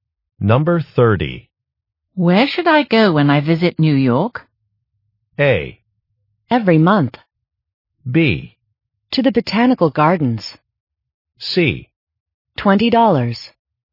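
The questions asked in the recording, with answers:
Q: Where should I go when I visit New York?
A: B: To the Botanical Gardens.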